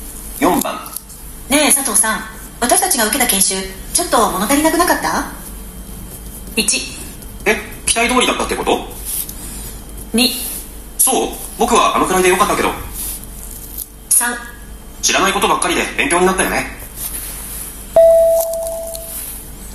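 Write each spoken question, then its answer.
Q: ねえ佐藤さん、私たちが受けた研修ちょっと物足りなくなかった。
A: 2: そう、僕はあのくらいでよかったけど。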